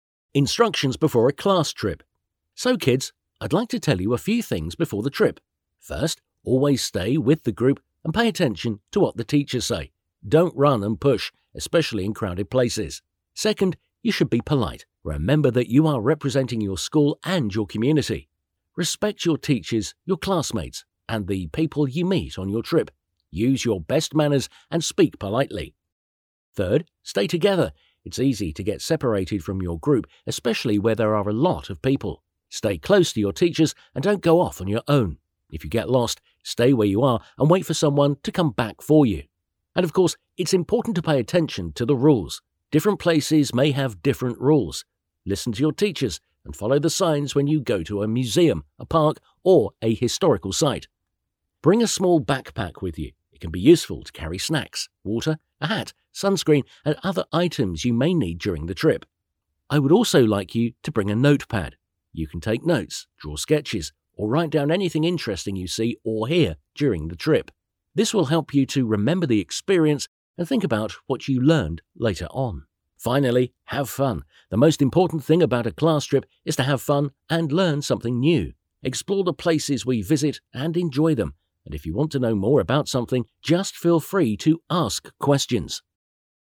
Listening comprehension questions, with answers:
Listen to the teacher giving instructions to the kids before the class trip and fill in the gaps in the summary of it below.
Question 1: The first thing the teacher tells the kids is to ......... (1) and pay attention to the teachers.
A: stay with the group

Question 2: They shouldn't .......... (2) in crowded places.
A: run and push

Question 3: The second thing is to .......... (3) as they ........... (4) their school and community.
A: be polite

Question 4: The second thing is to .......... (3) as they ........... (4) their school and community.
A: represent

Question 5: The third thing is to ......... (5) because it's easy to get .......... (6) from the group.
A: stay together

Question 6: The third thing is to ......... (5) because it's easy to get .......... (6) from the group.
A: separated

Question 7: If they get lost, they have to ......... (7) and ........... (8) for them.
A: stay where they are

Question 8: If they get lost, they have to ......... (7) and ........... (8) for them.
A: wait for someone to come back

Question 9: When they go to a museum, a park, or a historical site they have to listen to the teachers and ........... (9).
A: follow the signs

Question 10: A backpack can be useful to carry .......... (10), water, a hat and .......... (11) and other items.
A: snacks

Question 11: A backpack can be useful to carry .......... (10), water, a hat and .......... (11) and other items.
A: sunscreen

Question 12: The teacher would also like them to bring .......... (12) to write things down.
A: a notepad

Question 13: But the most important thing is to ........... (13) and to ........... (14) and they should feel free to .......... (15).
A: have fun

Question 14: But the most important thing is to ........... (13) and to ........... (14) and they should feel free to .......... (15).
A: learn something new

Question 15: But the most important thing is to ........... (13) and to ........... (14) and they should feel free to .......... (15).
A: ask questions

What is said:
Instructions before a class trip
So, kids, I'd like to tell you a few things before the trip. First, always stay with the group and pay attention to what the teachers say. Don't run and push, especially in crowded places.
Second, you should be polite. Remember that you are representing your school and your community. Respect your teachers, your classmates, and the people you meet on your trip. Use your best manners and speak politely.
Third, stay together: It's easy to get separated from your group especially where there are a lot of people. Stay close to your teachers and don't go off on your own. If you get lost, stay where you are and wait for someone to come back for you.
And of course, it's important to pay attention to the rules. Different places may have different rules. Listen to your teachers and follow the signs when you go to a museum, a park, or a historical site.
Bring a small backpack with you. It can be useful to carry snacks, water, a hat, sunscreen and other items you may need during the trip. I would also like you to bring a notepad. You can take notes, draw sketches, or write down anything interesting you see or hear during the trip. This will help you to remember the experience and think about what you learned later on.
Finally, have fun: The most important thing about a class trip is to have fun and learn something new. Explore the places we visit and enjoy them, and if you want to know more about something, just feel free to ask questions.

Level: ALAPFOK B1